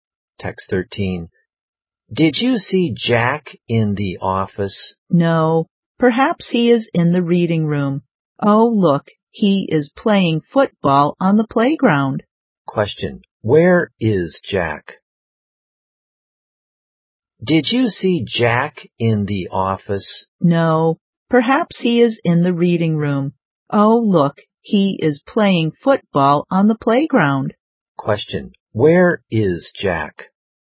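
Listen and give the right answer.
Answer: On the playground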